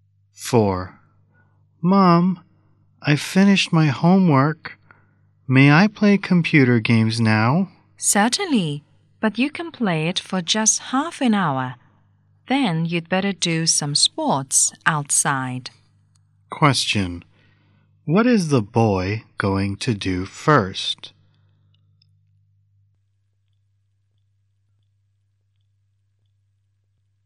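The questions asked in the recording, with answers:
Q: What is the boy going to do first?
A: Play computer games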